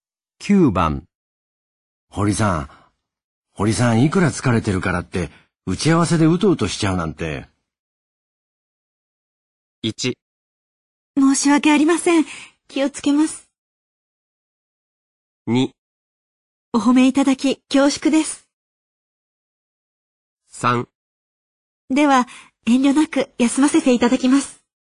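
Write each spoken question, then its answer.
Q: 堀さん、いくら疲れてるからって、打ち合わせでうとうとしちゃうなんて。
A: 1: 申し訳ありません。気をつけます。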